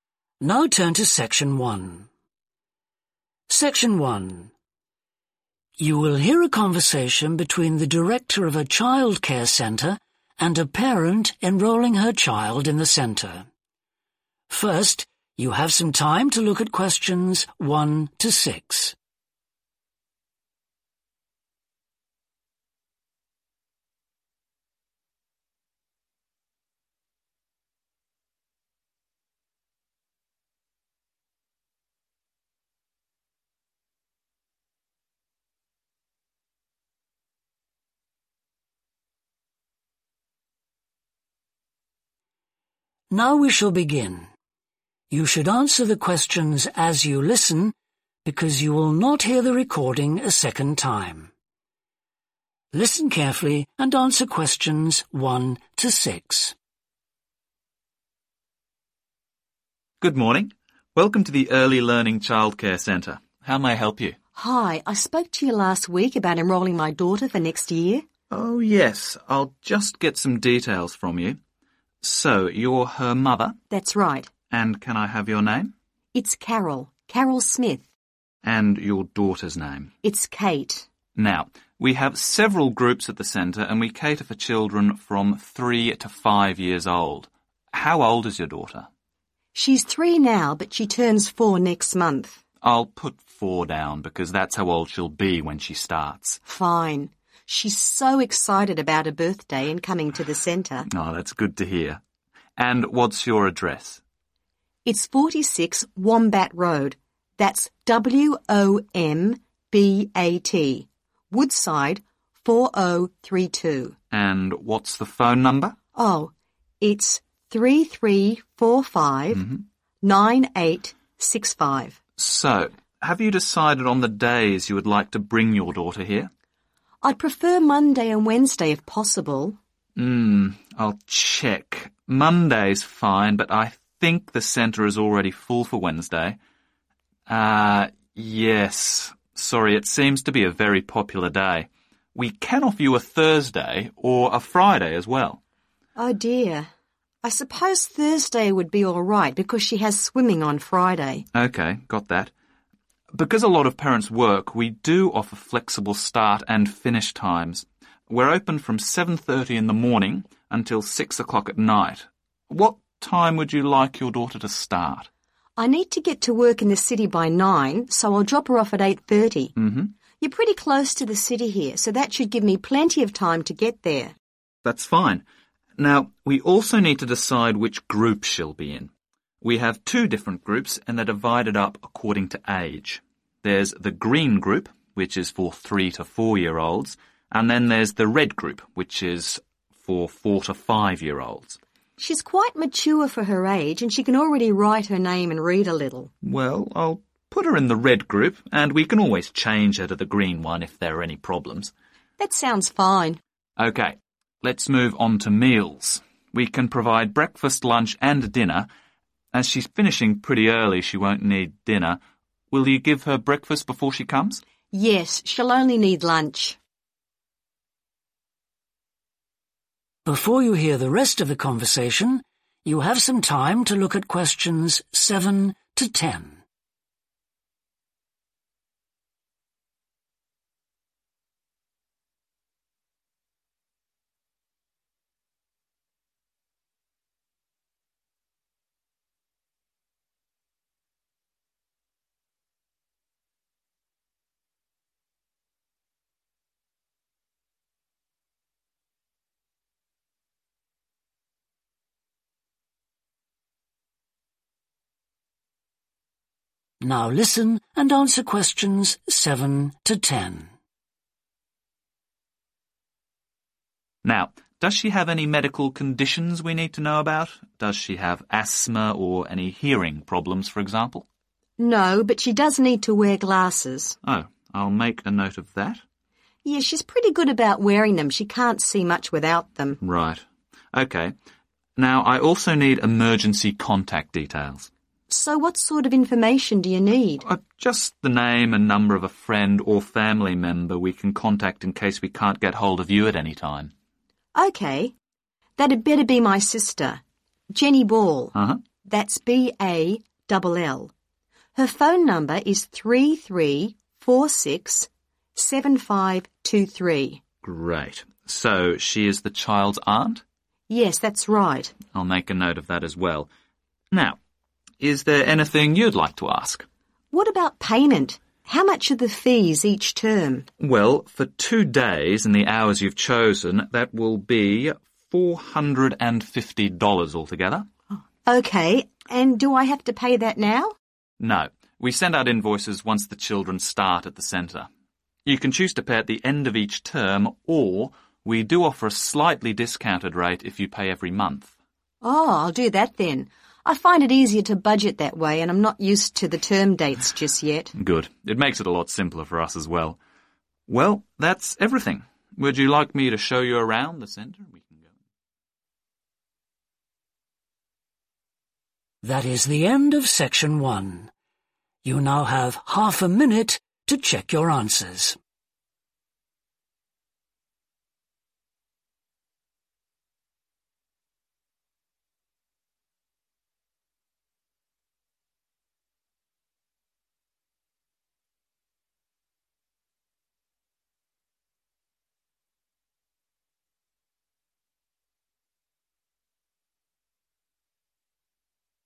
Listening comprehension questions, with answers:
Complete the form below. Write ONE WORD OR A NUMBER.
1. Age: (1)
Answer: 4

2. Address: (2) Road, Woodside 4032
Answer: 46 wombat

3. Days enrolled for: Monday and (3)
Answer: thursday

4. Start time: (4) am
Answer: 8.30

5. Childcare group: the (5) group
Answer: red

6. Which meals are required each day? (6)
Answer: lunch

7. Medical conditions: need (7)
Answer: glasses

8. Emergency contact: Jenny (8)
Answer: BALL

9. Relationship to child: (9)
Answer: aunt

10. Will pay each (10)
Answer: month